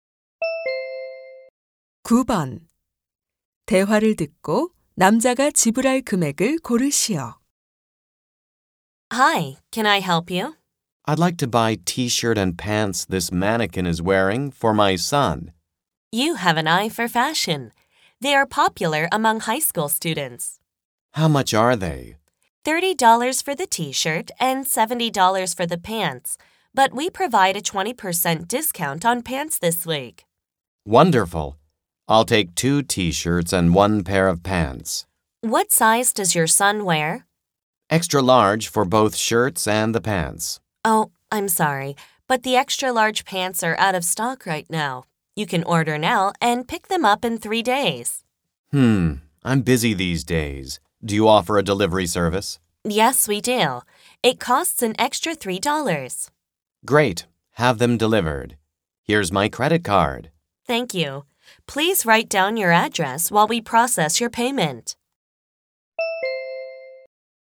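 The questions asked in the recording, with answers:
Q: 대화를 듣고 남자가 지불할 금액을 고르시오.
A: $119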